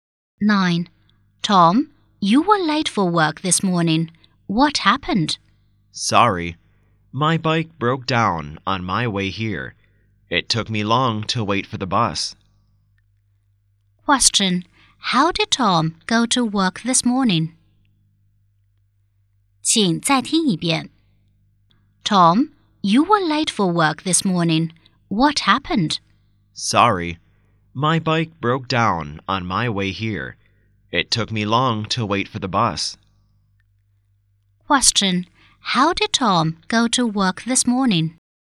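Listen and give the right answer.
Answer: By bus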